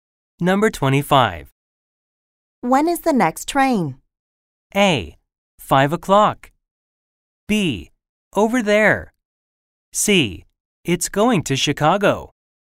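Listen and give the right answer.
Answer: A: 5 o'clock.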